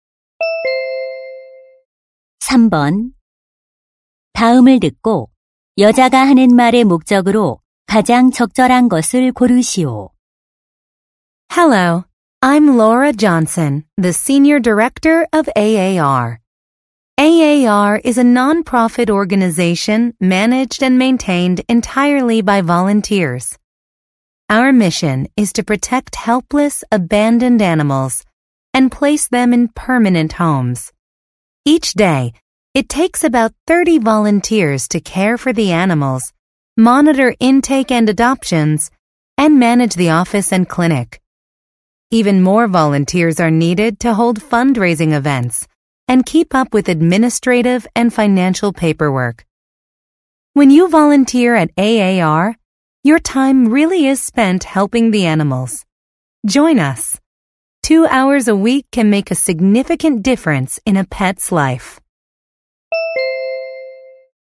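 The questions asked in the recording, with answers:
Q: 다음을 듣고 여자가 하는 말의 목적으로 가장 적절한 것을 고르시오.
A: 동물 보호 단체 자원봉사자 모집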